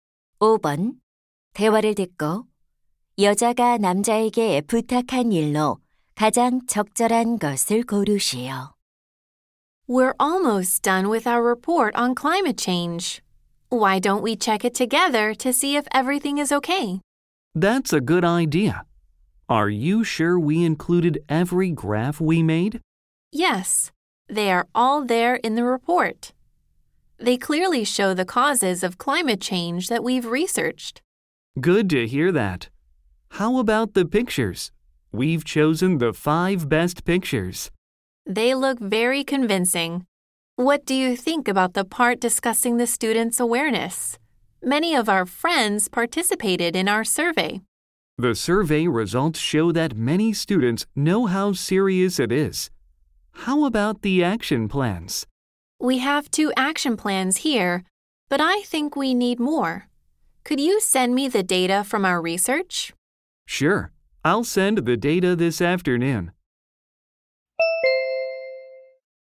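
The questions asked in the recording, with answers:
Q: 대화를 듣고 여자가 남자에게 부탁한 일로 가장 적절한 것을 고르시오.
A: 조사 자료 보내주기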